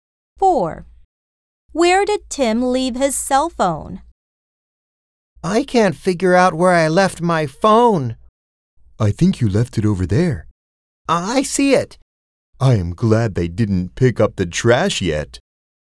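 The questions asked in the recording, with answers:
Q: Where did Tim leave his cell phone?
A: In the trash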